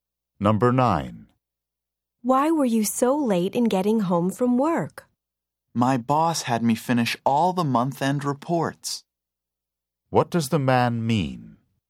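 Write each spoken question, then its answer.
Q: What does the man mean?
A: He had to stay late to finish reports for his boss.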